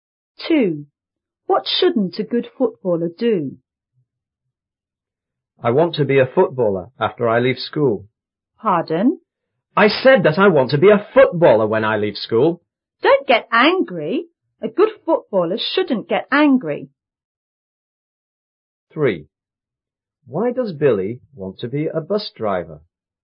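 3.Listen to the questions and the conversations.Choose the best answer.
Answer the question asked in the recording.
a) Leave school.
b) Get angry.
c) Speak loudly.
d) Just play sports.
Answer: b) Get angry.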